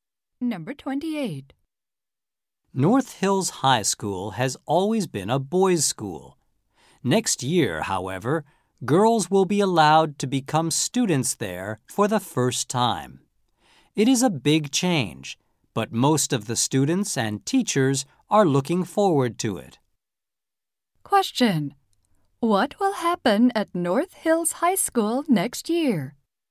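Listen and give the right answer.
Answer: Girls will be allowed to attend.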